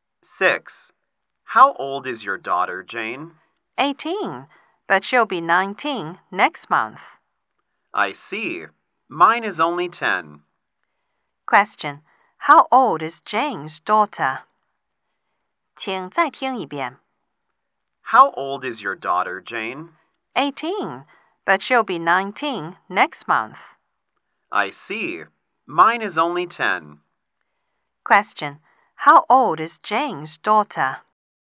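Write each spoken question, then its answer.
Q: Question. How old is Jane's daughter?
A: 18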